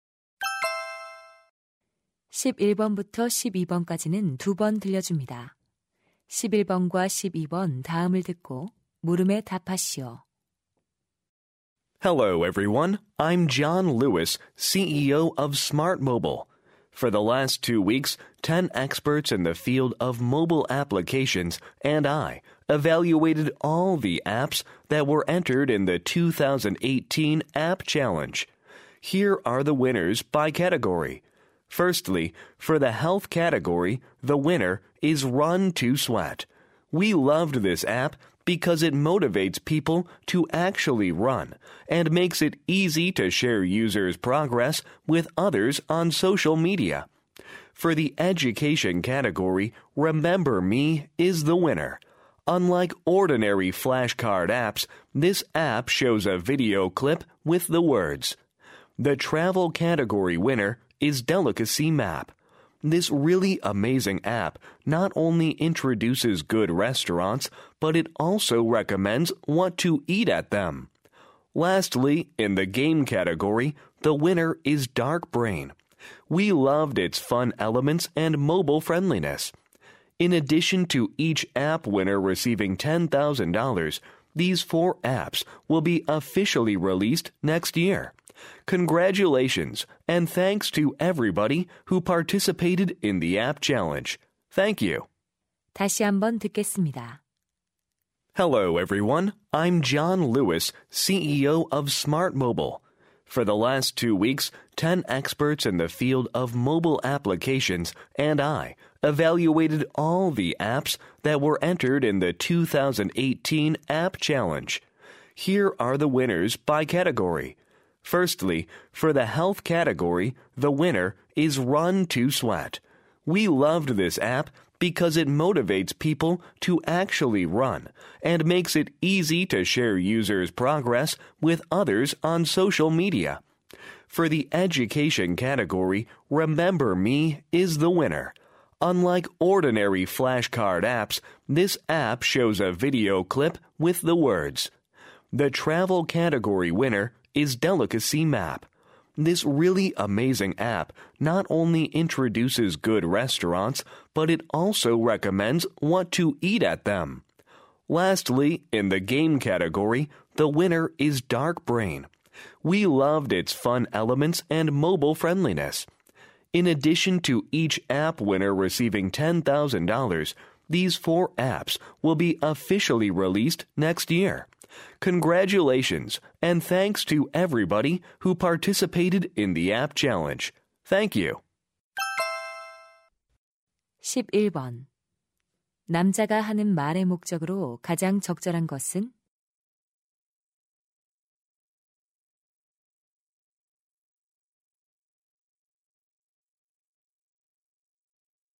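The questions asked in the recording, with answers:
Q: 남자가 하는 말의 목적으로 가장 적절한 것은?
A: 앱 챌린지 부문별 수상작을 발표하려고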